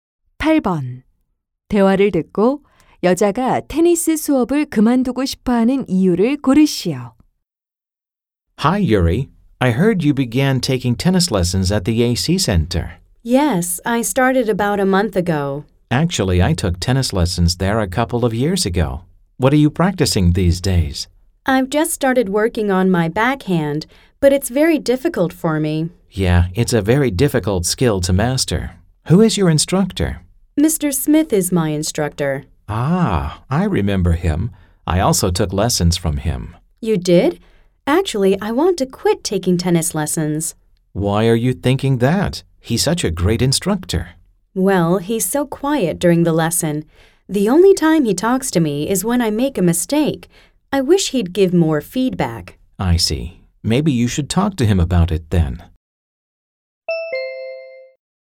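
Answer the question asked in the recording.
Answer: The instructor doesn't give enough feedback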